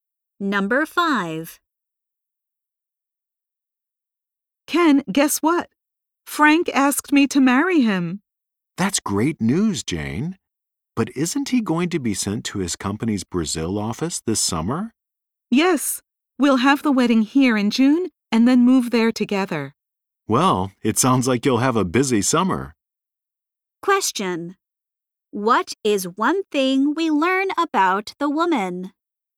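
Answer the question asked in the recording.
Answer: She will get married in June and move to Brazil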